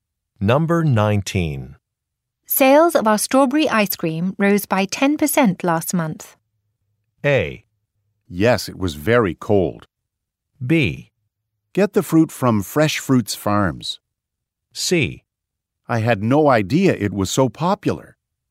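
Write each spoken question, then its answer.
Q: Sales of our strawberry ice cream rose by 10% last month.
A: C: I had no idea it was so popular.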